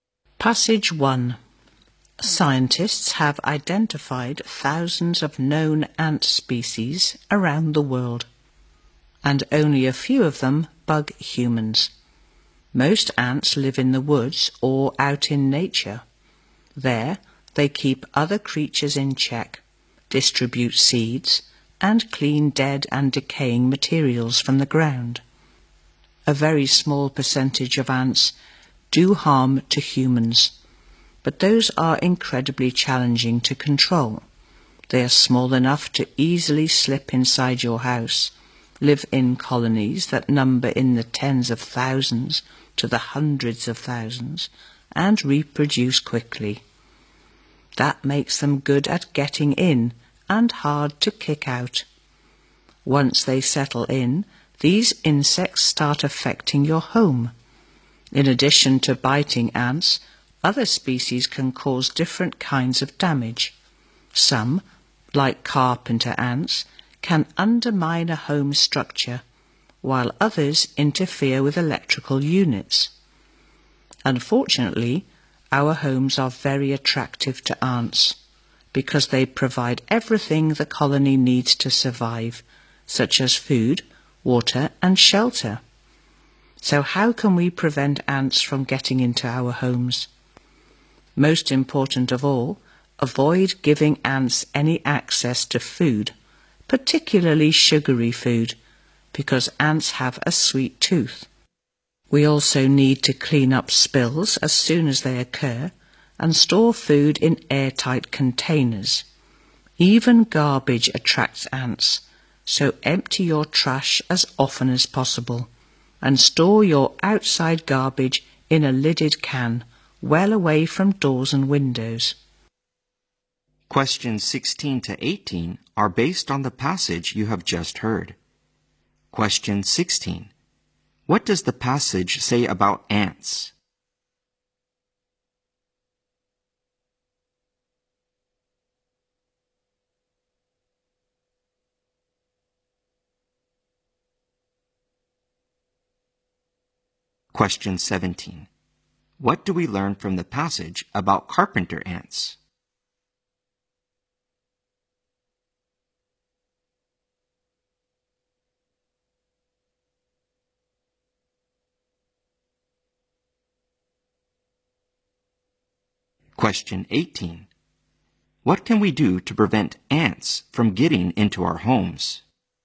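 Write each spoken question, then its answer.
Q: What do we learn from the passage about carpenter ants?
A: They can damage a home's structure.

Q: What can we do to prevent ants from getting into our homes?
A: Keep food, especially sugary food, away from them.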